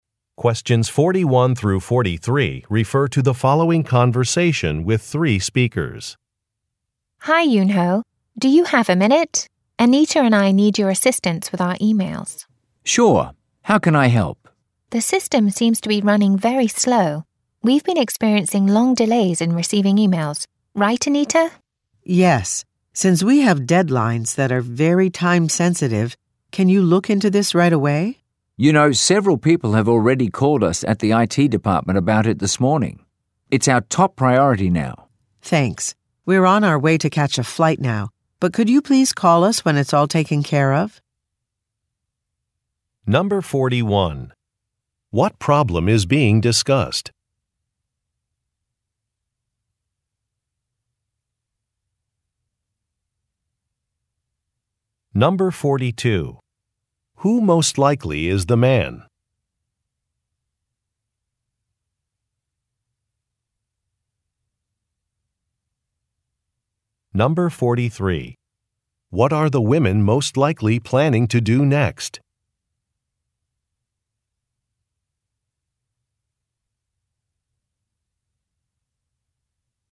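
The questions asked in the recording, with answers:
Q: What problem is being discussed?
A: Emails are arriving with long delays

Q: Who most likely is the man?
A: An IT department worker

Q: What are the women most likely planning to do next?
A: Catch a flight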